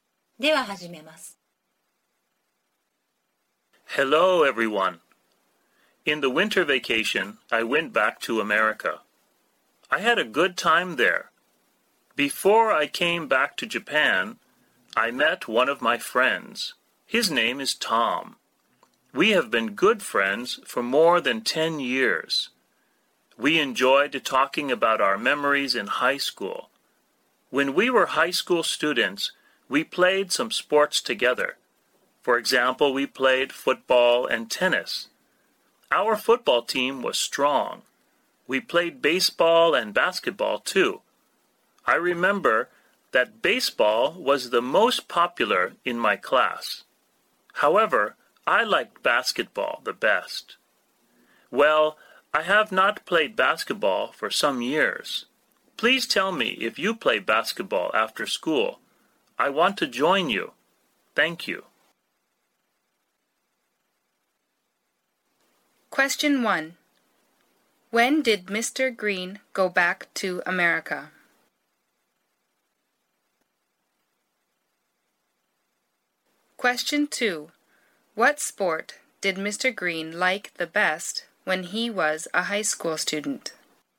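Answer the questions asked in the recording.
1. In the winter vacation
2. Basketball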